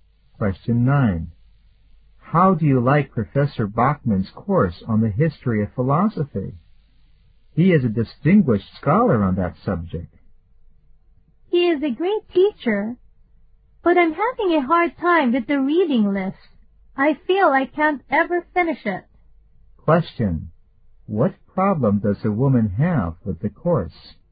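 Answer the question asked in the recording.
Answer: She can't finish the reading list.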